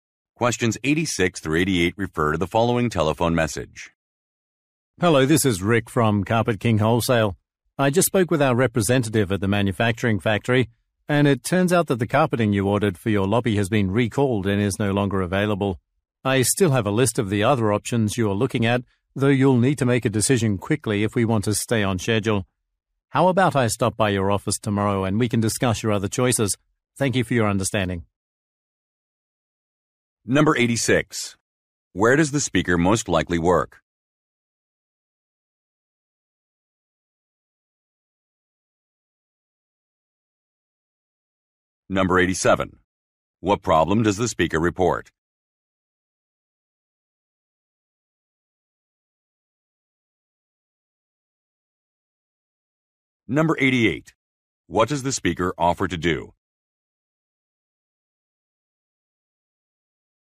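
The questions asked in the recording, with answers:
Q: Where does the speaker most likely work?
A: At a carpet wholesaler

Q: What problem does the speaker report?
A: The ordered carpeting was recalled and is unavailable

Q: What does the speaker offer to do?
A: Visit the listener's office tomorrow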